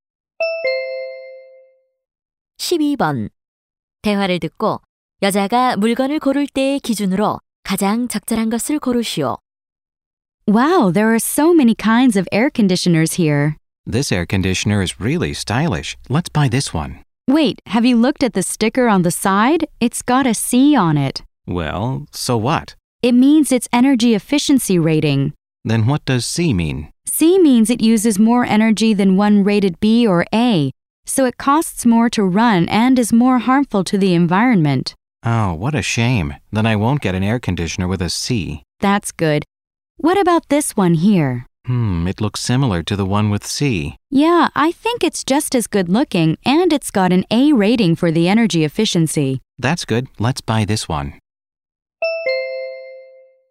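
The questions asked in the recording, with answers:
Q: 대화를 듣고 여자가 물건을 고를 때의 기준으로 가장 적절한 것을 고르시오.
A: 에너지 효율 등급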